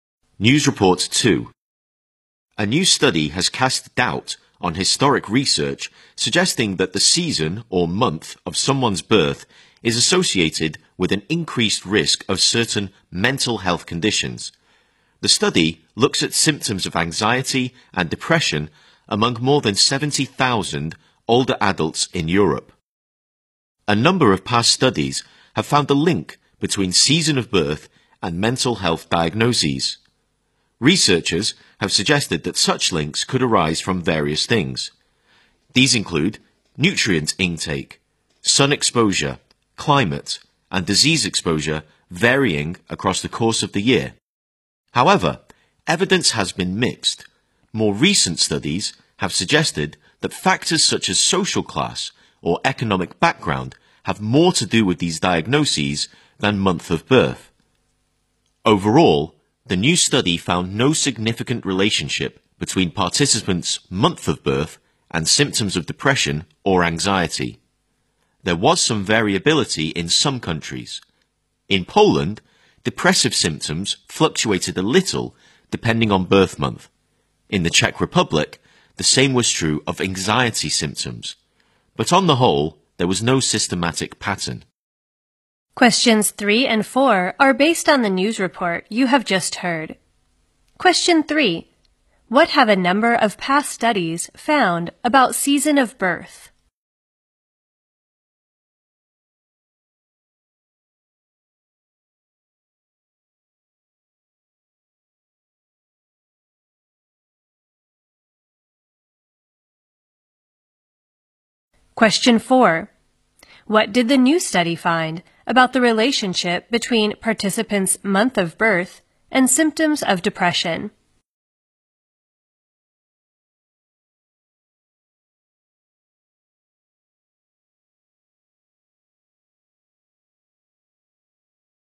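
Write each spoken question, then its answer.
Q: What have a number of past studies found about season of birth?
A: It is linked to mental health diagnoses

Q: What did the new study find about the relationship between participants' month of birth and symptoms of depression?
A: No significant relationship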